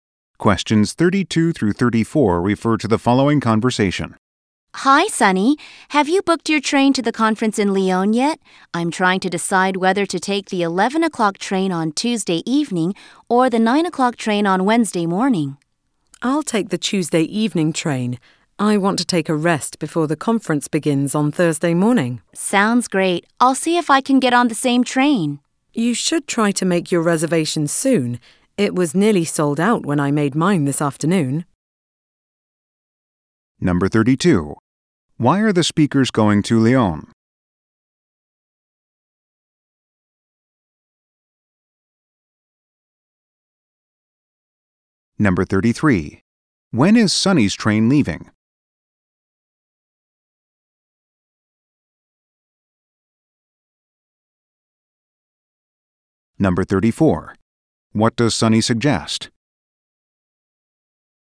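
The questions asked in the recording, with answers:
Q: Why are the speakers going to Lyon?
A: To attend a conference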